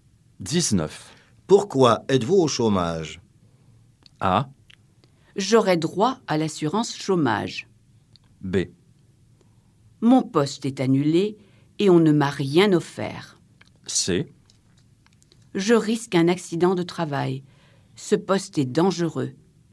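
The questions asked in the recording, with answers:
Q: Pourquoi êtes-vous au chômage?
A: B: Mon poste est annulé et on ne m'a rien offert.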